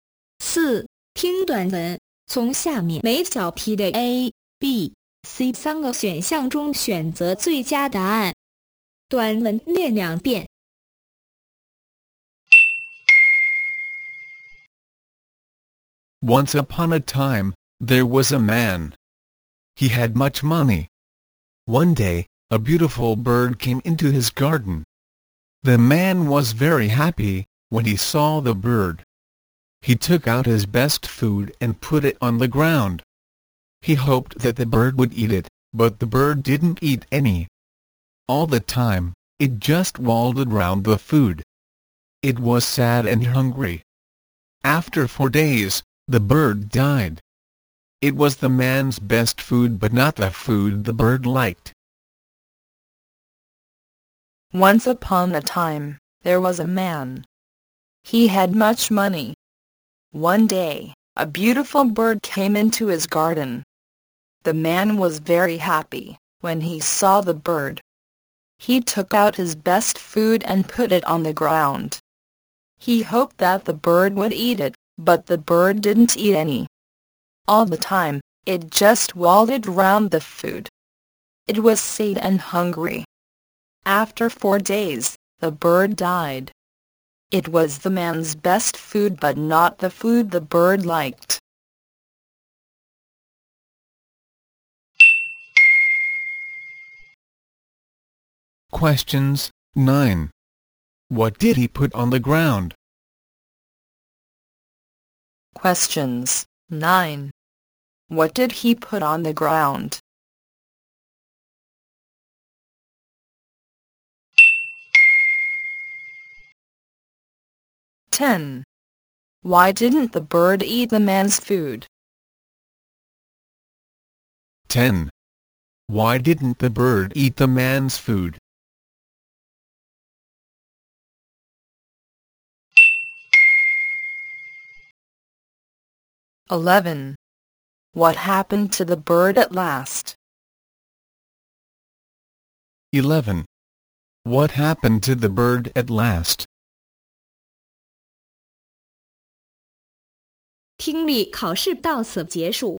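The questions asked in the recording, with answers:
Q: What did he put on the ground?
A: His best food

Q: Why didn't the bird eat the man's food?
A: It wasn't the food the bird liked

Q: What happened to the bird at last?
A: It died after 4 days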